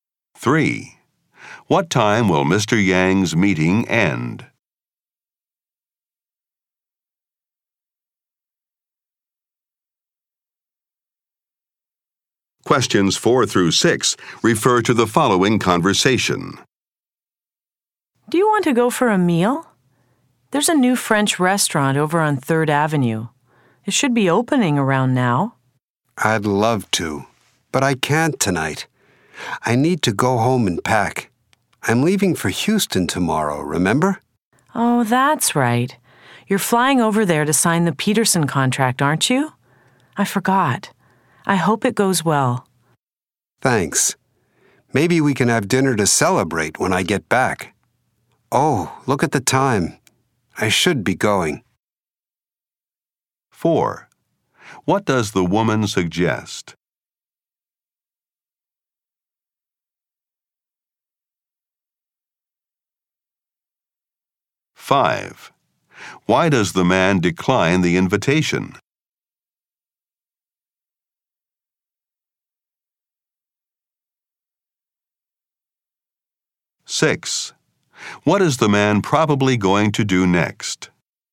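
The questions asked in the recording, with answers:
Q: What does the woman suggest?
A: Going for a meal at a new French restaurant

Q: Why does the man decline the invitation?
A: He needs to go home and pack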